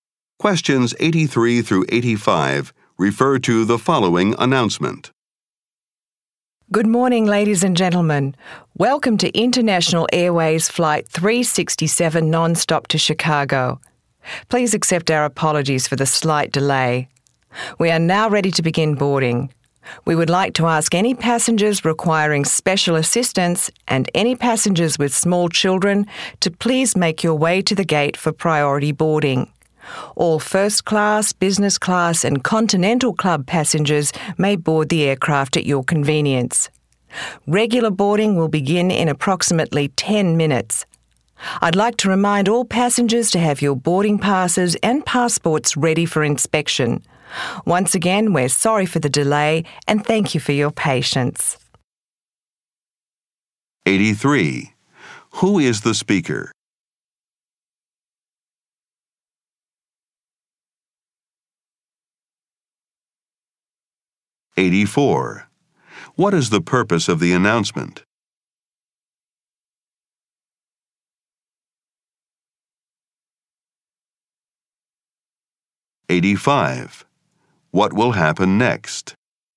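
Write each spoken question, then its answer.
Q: What is the purpose of the announcement?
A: To announce the start of boarding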